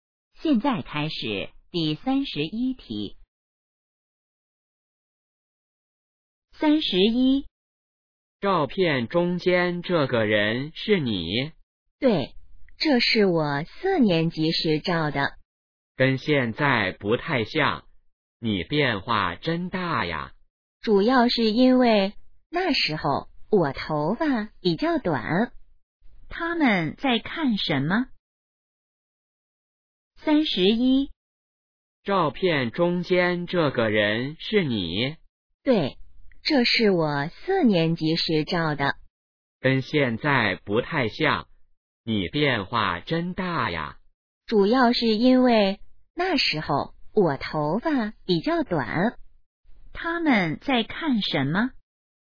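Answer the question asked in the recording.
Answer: 照片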